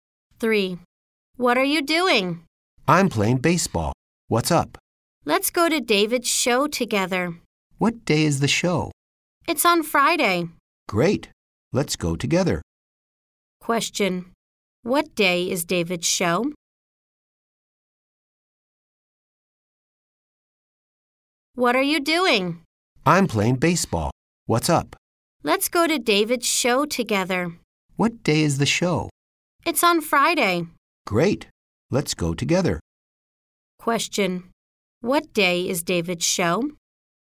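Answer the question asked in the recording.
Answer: Friday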